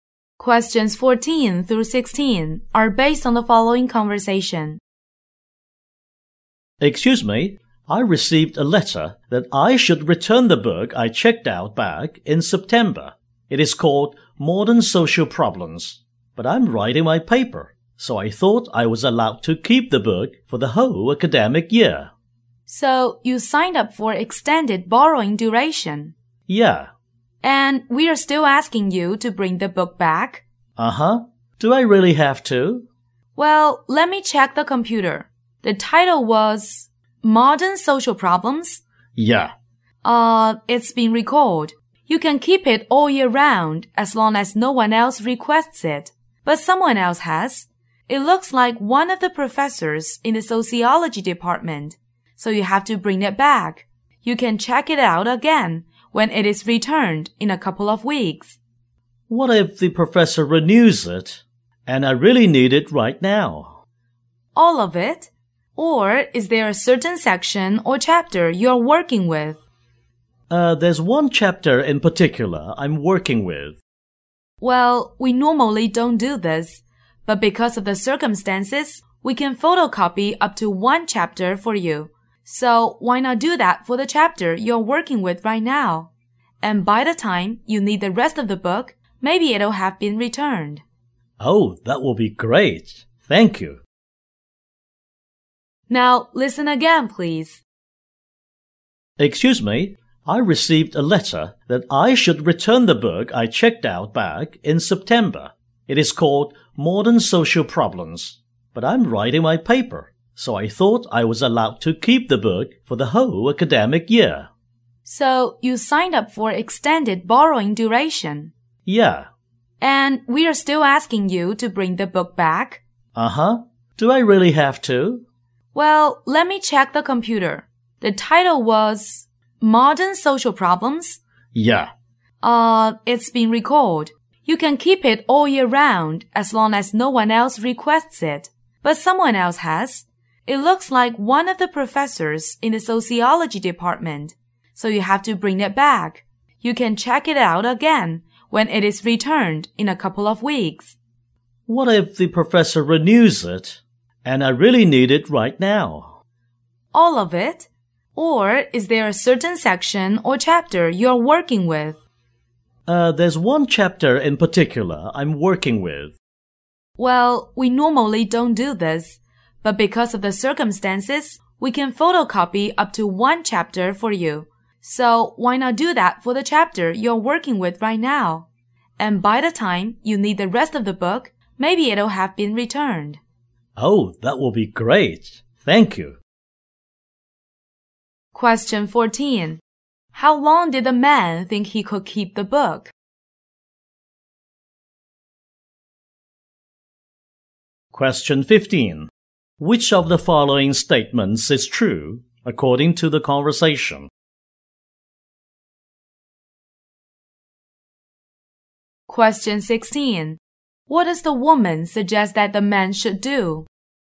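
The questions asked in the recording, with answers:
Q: How long did the man think he could keep the book?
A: The whole academic year

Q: What does the woman suggest that the man should do?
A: Photocopy the chapter he is working on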